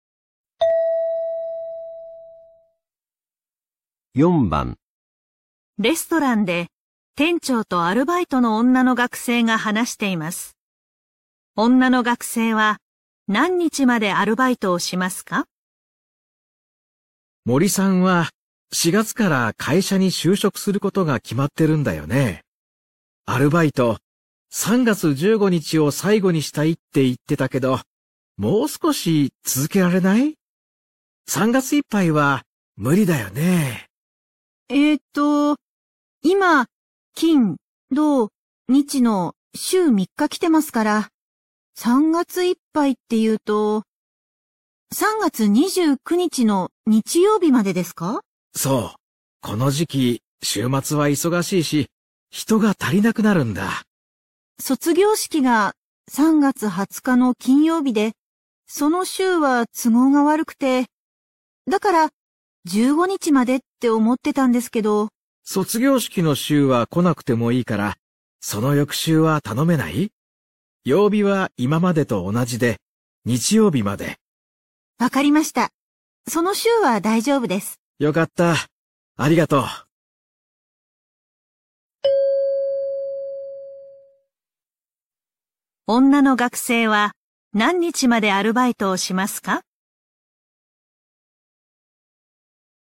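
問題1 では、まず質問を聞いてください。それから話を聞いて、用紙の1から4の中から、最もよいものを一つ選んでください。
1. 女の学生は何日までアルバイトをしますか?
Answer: 3月29日

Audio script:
レストランで、店長とアルバイトの女の学生が話しています。女の学生は何日までアルバイトをしますか?
男:森さんは4月から会社に就職することが決まってるんだよね?
アルバイト、3月15日を最後にしたいって言ってだけど、もう少し続けられない?
3月いっぱいは無理だよね?
男:そう。この時期、週末は忙しいし人が足りなくなるんだ。
男:卒業式の週は来なくていいからその翌週は頼めない?曜日は今までと同じで日曜日まで。
女:わかりました。その週は大丈夫です。
男:よかった。ありがとう。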